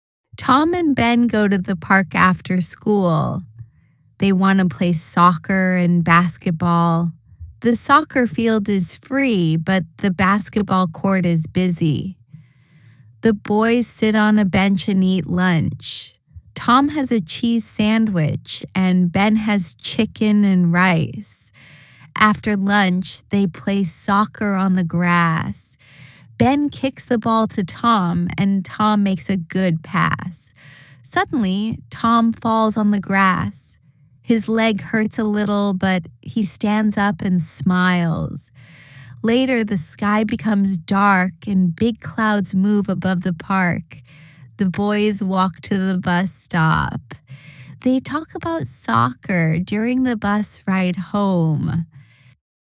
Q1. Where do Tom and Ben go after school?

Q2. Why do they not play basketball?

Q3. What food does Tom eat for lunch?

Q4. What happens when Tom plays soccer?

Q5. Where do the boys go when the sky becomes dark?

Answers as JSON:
{"1": "They go to the park after school.", "2": "They do not play basketball because the basketball court is busy.", "3": "Tom eats a cheese sandwich for lunch.", "4": "Tom falls on the grass and his leg hurts a little.", "5": "They go to the bus stop when the sky becomes dark."}